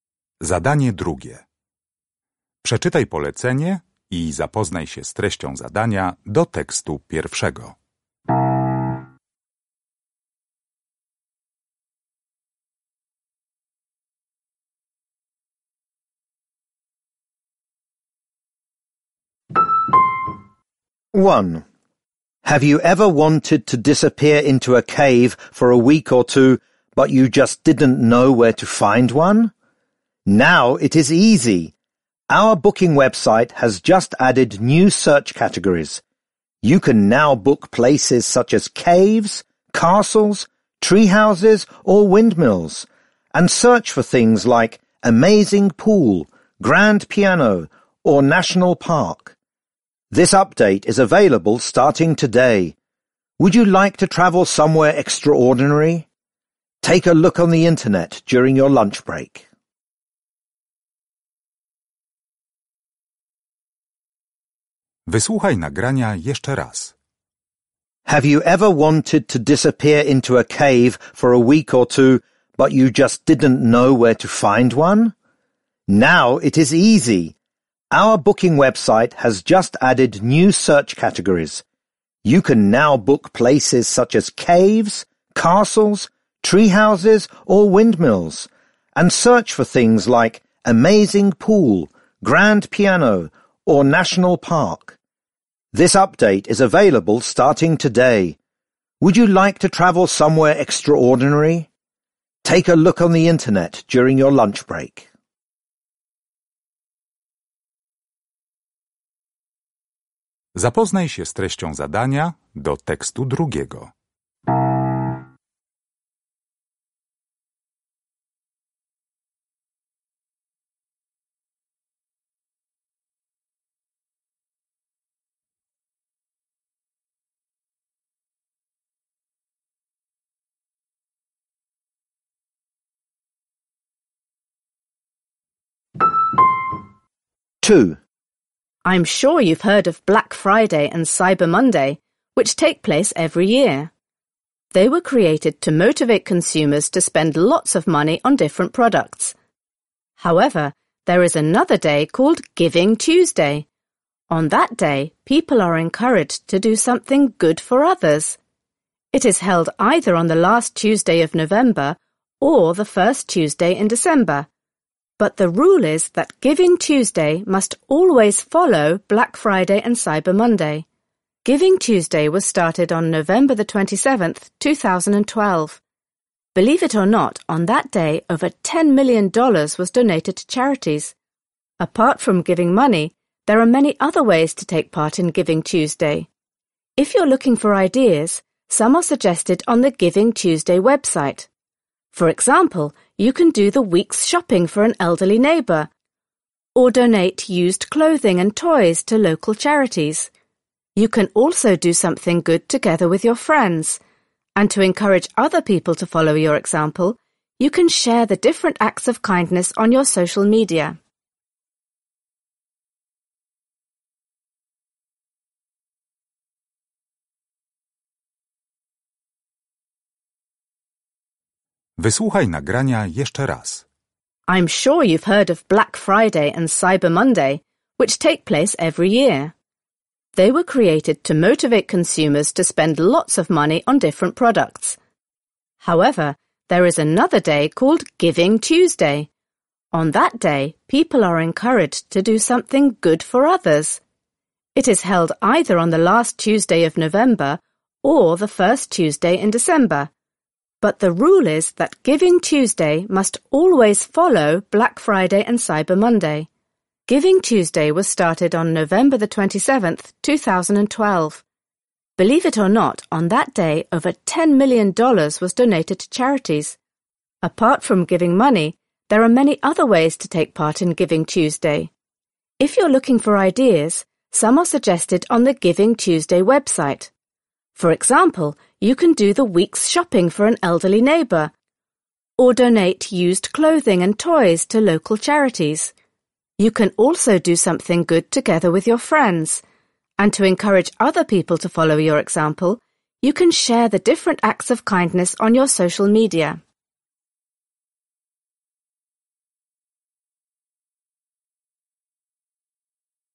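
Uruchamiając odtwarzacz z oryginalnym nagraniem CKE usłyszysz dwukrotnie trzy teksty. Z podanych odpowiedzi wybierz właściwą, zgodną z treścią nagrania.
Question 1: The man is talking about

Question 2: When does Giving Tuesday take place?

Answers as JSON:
{"1": "new search categories on a booking website", "2": "on the last Tuesday of November or the first Tuesday in December, always after Black Friday and Cyber Monday"}

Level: poziom podstawowy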